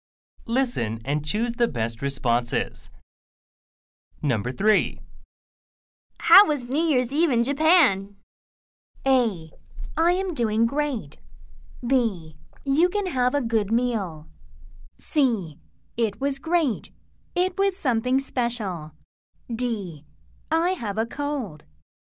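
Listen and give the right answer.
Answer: C: It was great. It was something special.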